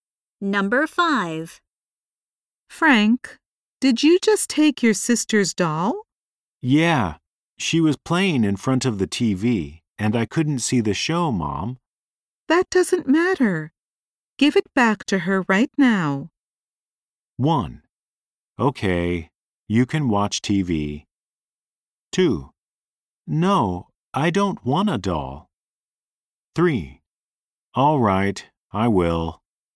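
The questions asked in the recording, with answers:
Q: That doesn't matter. Give it back to her right now.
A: 3: All right, I will.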